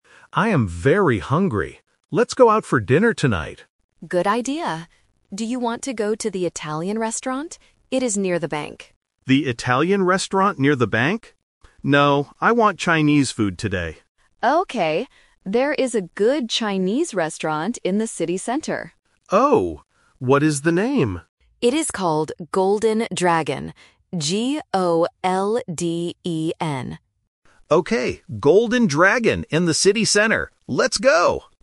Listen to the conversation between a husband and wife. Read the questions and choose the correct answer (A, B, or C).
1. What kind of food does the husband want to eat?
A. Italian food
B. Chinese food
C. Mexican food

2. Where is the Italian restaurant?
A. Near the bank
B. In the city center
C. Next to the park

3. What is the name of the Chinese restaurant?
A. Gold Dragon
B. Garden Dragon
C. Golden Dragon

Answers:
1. B. Chinese food
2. A. Near the bank
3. C. Golden Dragon

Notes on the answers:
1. The husband says clearly, "No, I want Chinese food today." Why the traps are wrong: Option A is a trap because the wife asks about the "Italian restaurant," but the husband says "No." Option C is a plausible type of food but is never mentioned.
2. The wife says, "Do you want to go to the Italian restaurant? It is near the bank." Why the traps are wrong: Option B is a trap because "in the city center" is the location of the Chinese restaurant, not the Italian one. Option C introduces a place (park) not mentioned in the audio.
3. The wife explicitly states the name and spells it out: "It is called Golden Dragon. G-O-L-D-E-N." Why the traps are wrong: Options A and B are phonetic traps. "Gold" and "Garden" sound similar to "Golden," testing if the student can follow the exact spelling provided in the audio.

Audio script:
Husband: I am very hungry. Let's go out for dinner tonight.
Wife: Good idea. Do you want to go to the Italian restaurant? It is near the bank.
Husband: The Italian restaurant near the bank? No, I want Chinese food today.
Wife: Okay. There is a good Chinese restaurant in the city center.
Husband: Oh? What is the name?
Wife: It is called Golden Dragon. G-O-L-D-E-N.
Husband: Okay, Golden Dragon in the city center. Let's go!

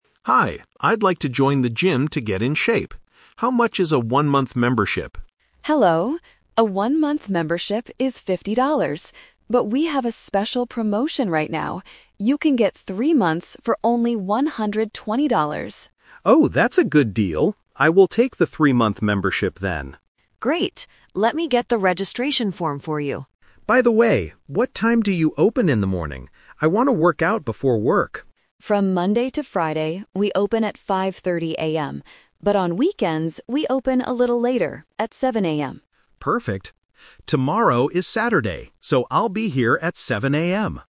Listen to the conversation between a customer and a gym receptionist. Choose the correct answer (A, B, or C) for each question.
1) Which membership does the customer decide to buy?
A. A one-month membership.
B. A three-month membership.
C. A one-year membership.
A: B. A three-month membership.

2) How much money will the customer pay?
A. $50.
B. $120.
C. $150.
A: B. $120.

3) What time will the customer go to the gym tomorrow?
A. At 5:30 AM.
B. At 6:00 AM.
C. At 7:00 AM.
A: C. At 7:00 AM.

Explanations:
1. The customer says, "I will take the three-month membership, then." Option (A) is a trap; he originally asked for a one-month membership but changed his mind because of the promotion. Option (C) is a plausible gym membership but is never mentioned.
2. The receptionist says the three-month membership is $120, and the customer decides to buy it. Option (A) is a trap; $50 is the price for only one month. Option (C) is a trap; it is plausible if he bought three 1-month memberships ($50 x 3), but that is not the promotion price.
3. The customer says, "Tomorrow is Saturday, so I'll be here at 7:00 AM." Option (A) is a trap; 5:30 AM is the opening time for weekdays (Monday to Friday). Option (B) is a plausible morning time but is not mentioned in the audio.

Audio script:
Customer: Hi, I'd like to join the gym to get in shape. How much is a one-month membership?
Receptionist: Hello! A one-month membership is $50. But we have a special promotion right now. You can get three months for only $120.
Customer: Oh, that's a good deal. I will take the three-month membership, then.
Receptionist: Great! Let me get the registration form for you.
Customer: By the way, what time do you open in the morning? I want to work out before work.
Receptionist: From Monday to Friday, we open at 5:30 AM. But on weekends, we open a little later, at 7:00 AM.

